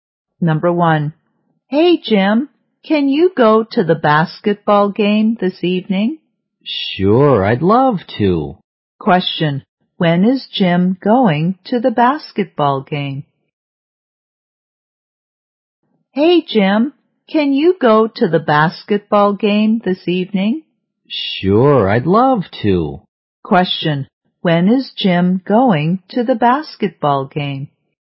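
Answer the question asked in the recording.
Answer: This evening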